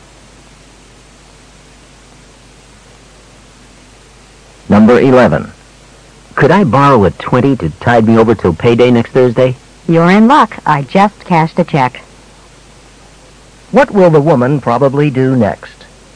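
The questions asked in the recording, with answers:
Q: What will the woman probably do next?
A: Lend him $20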